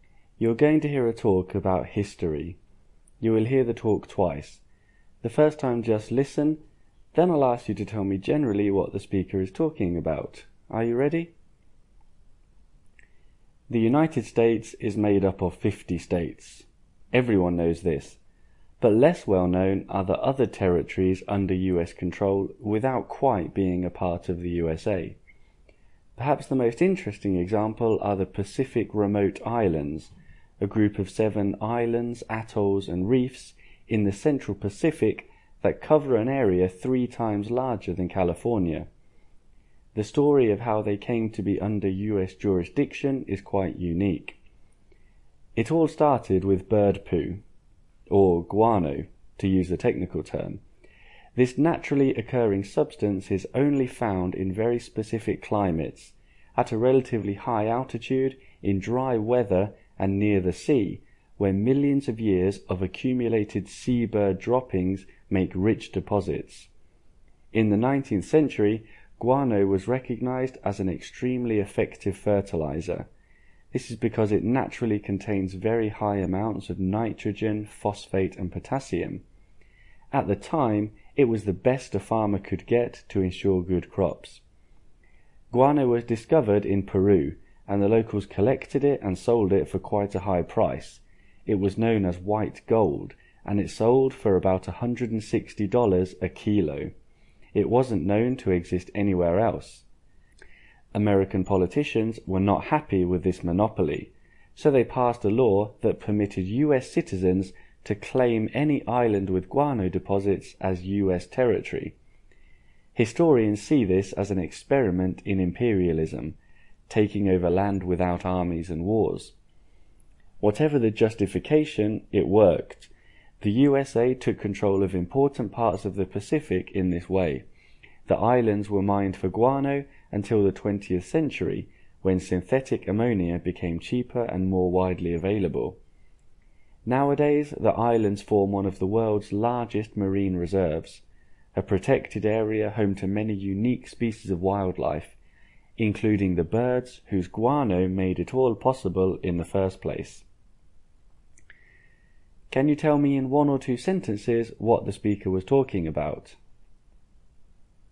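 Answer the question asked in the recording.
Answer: How the US gained control of the Pacific Remote Islands because of guano (bird droppings) deposits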